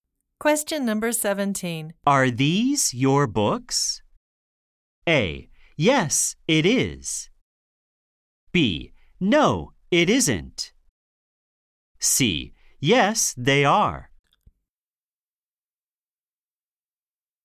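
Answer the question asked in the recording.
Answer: C: Yes, they are.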